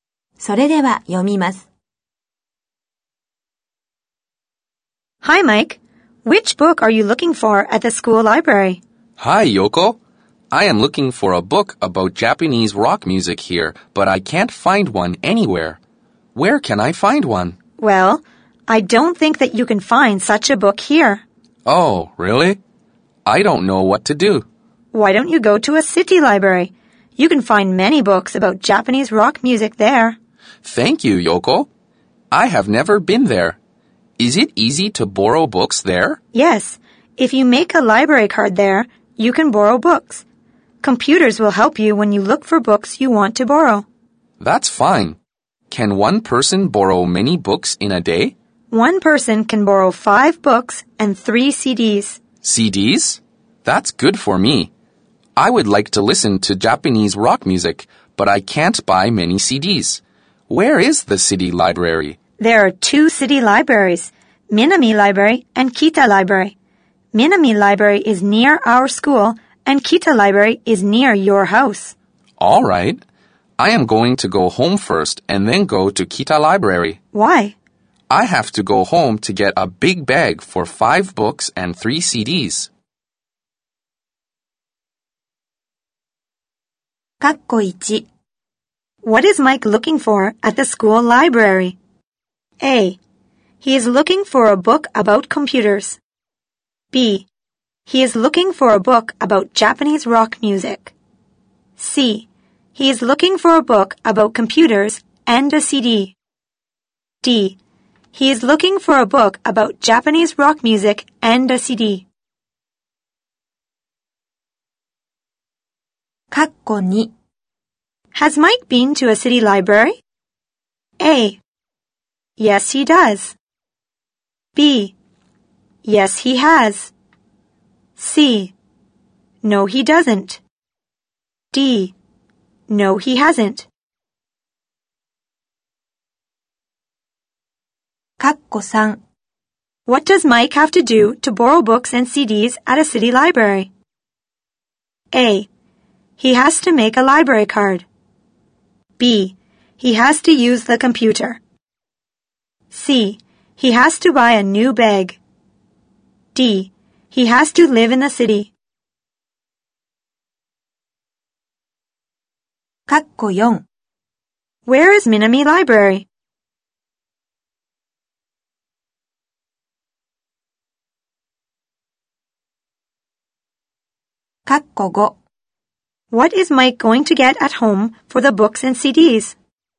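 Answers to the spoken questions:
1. B: He is looking for a book about Japanese rock music.
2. D: No, he hasn't.
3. A: He has to make a library card.
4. It is near Yoko and Mike's school.
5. A big bag.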